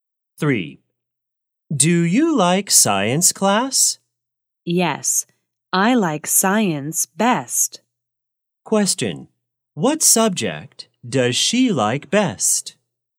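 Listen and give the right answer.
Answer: Science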